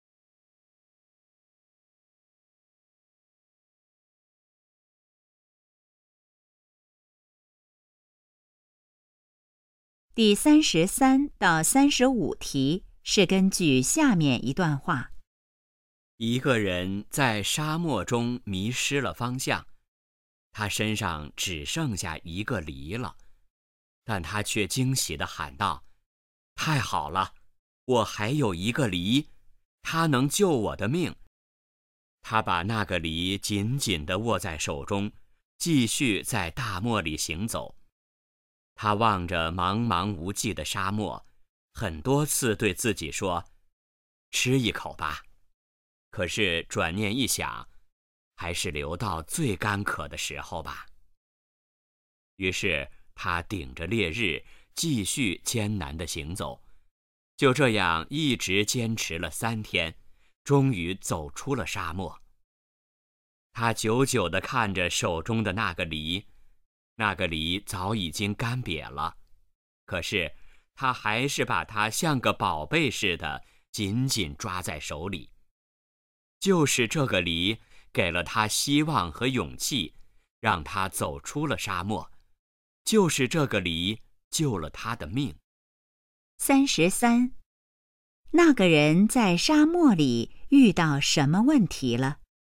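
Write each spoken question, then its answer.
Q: 那个人在沙漠里遇到什么问题了?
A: 迷失了方向

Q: 那个人为什么不吃梨?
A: 想留到最干渴的时候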